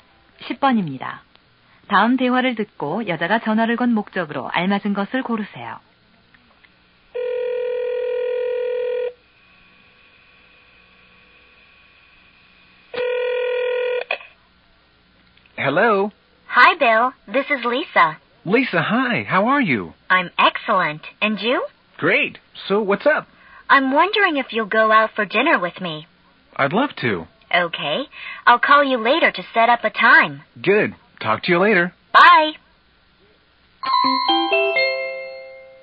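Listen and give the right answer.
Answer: 저녁 식사를 함께 하자고 하려고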